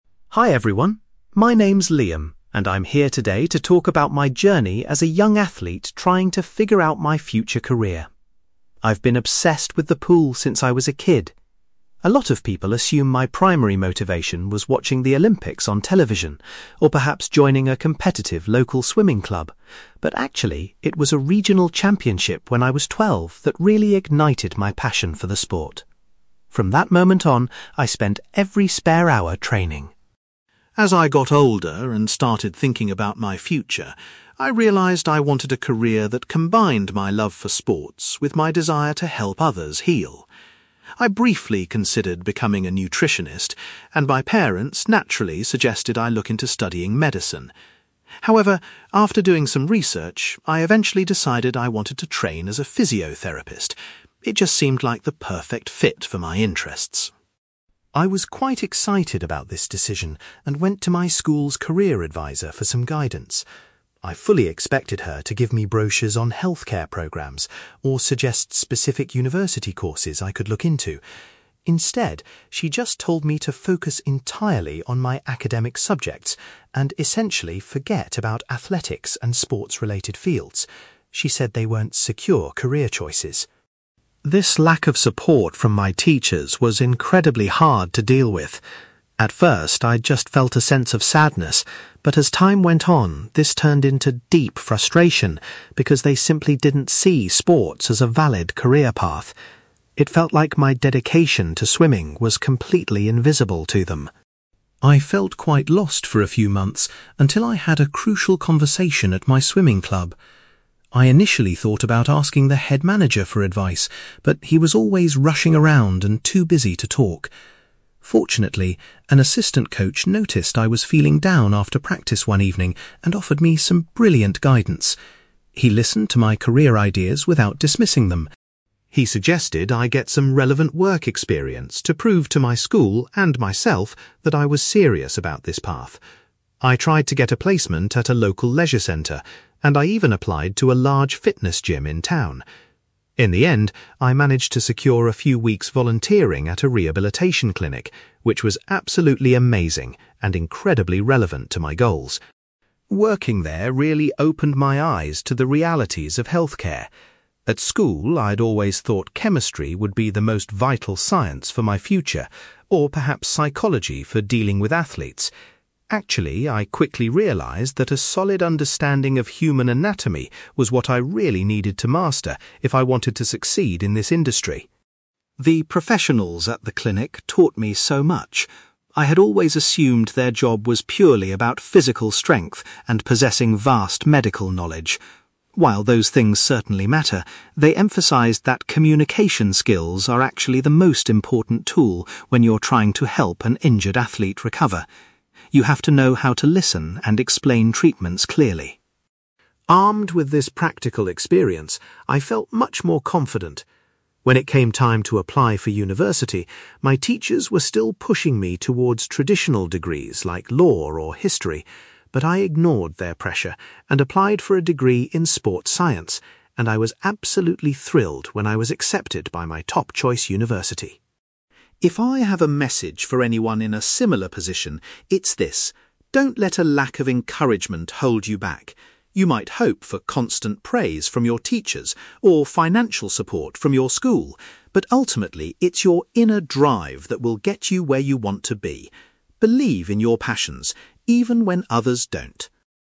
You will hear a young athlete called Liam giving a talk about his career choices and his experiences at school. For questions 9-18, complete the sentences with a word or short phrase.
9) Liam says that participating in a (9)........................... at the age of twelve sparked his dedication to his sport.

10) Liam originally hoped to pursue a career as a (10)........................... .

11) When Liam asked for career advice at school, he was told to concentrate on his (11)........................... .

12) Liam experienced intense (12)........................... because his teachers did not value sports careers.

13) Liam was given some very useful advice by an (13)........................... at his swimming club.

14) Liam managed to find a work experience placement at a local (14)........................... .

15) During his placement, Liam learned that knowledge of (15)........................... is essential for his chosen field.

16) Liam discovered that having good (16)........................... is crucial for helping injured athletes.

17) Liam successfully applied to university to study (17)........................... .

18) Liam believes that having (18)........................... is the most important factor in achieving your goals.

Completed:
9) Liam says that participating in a regional championship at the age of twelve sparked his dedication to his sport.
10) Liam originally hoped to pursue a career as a physiotherapist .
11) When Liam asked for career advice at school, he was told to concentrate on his academic subjects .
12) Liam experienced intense frustration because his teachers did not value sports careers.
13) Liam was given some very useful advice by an assistant coach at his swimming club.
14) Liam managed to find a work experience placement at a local rehabilitation clinic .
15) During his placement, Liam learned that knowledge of human anatomy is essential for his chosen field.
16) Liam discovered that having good communication skills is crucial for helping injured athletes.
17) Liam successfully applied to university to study sports science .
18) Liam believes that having inner drive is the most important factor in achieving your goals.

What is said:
Liam: Hi everyone. My name is Liam, and I'm here today to talk about my journey as a young athlete trying to figure out my future career. I've been obsessed with the pool since I was a kid. A lot of people assume my primary motivation was watching the Olympics on television, or perhaps joining a competitive local swimming club, but actually, it was a regional championship when I was twelve that really ignited my passion for the sport. From that moment on, I spent every spare hour training.
As I got older and started thinking about my future, I realised I wanted a career that combined my love for sports with my desire to help others heal. I briefly considered becoming a nutritionist, and my parents naturally suggested I look into studying medicine. However, after doing some research, I eventually decided I wanted to train as a physiotherapist. It just seemed like the perfect fit for my interests.
I was quite excited about this decision and went to my school's career advisor for some guidance. I fully expected her to give me brochures on healthcare programs or suggest specific university courses I could look into. Instead, she just told me to focus entirely on my academic subjects and essentially forget about athletics and sports-related fields. She said they weren't secure career choices.
This lack of support from my teachers was incredibly hard to deal with. At first, I just felt a sense of sadness, but as time went on, this turned into deep frustration, because they simply didn't see sports as a valid career path. It felt like my dedication to swimming was completely invisible to them.
I felt quite lost for a few months until I had a crucial conversation at my swimming club. I initially thought about asking the head manager for advice, but he was always rushing around and too busy to talk. Fortunately, an assistant coach noticed I was feeling down after practice one evening and offered me some brilliant guidance. He listened to my career ideas without dismissing them.
He suggested I get some relevant work experience to prove to my school—and myself—that I was serious about this path. I tried to get a placement at a local leisure centre, and I even applied to a large fitness gym in town. In the end, I managed to secure a few weeks volunteering at a rehabilitation clinic, which was absolutely amazing and incredibly relevant to my goals.
Working there really opened my eyes to the realities of healthcare. At school, I'd always thought chemistry would be the most vital science for my future, or perhaps psychology for dealing with athletes. Actually, I quickly realised that a solid understanding of human anatomy was what I really needed to master if I wanted to succeed in this industry.
The professionals at the clinic taught me so much. I had always assumed their job was purely about physical strength and possessing vast medical knowledge. While those things certainly matter, they emphasized that communication skills are actually the most important tool when you're trying to help an injured athlete recover. You have to know how to listen and explain treatments clearly.
Armed with this practical experience, I felt much more confident. When it came time to apply for university, my teachers were still pushing me towards traditional degrees like law or history. But I ignored their pressure and applied for a degree in sports science, and I was absolutely thrilled when I was accepted by my top-choice university.
If I have a message for anyone in a similar position, it's this: don't let a lack of encouragement hold you back. You might hope for constant praise from your teachers or financial support from your school, but ultimately, it's your inner drive that will get you where you want to be. Believe in your passions, even when others don't.

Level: B2